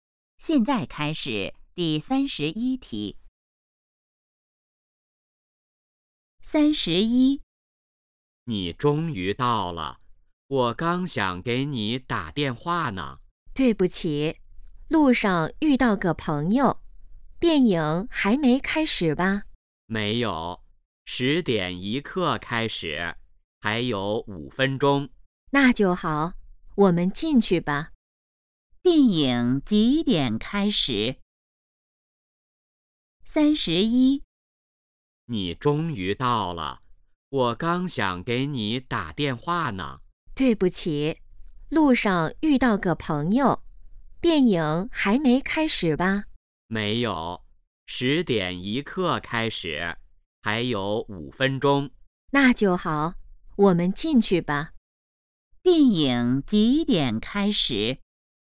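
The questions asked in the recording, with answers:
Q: 电影几点开始?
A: 十点一刻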